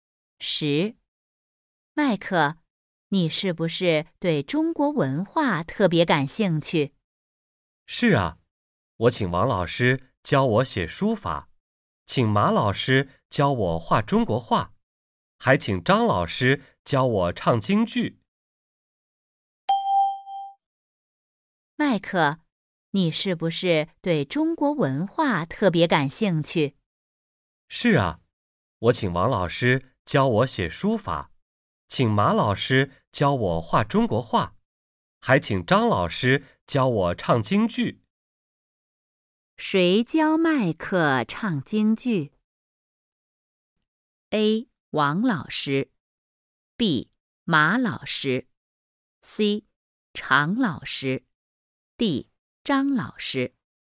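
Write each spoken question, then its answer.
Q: 谁教麦克唱京剧?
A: D: 张老师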